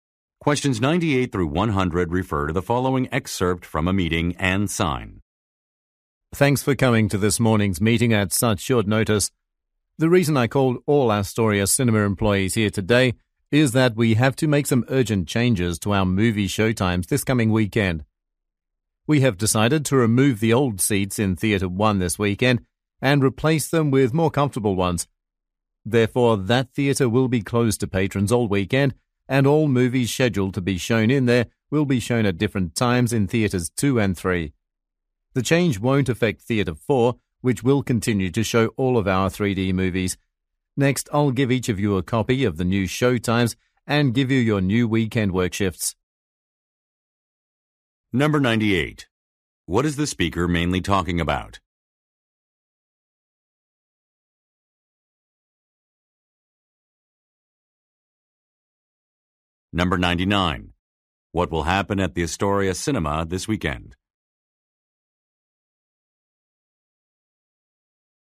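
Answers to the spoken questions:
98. Changes to movie showtimes this weekend
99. The seats in Theatre 1 will be replaced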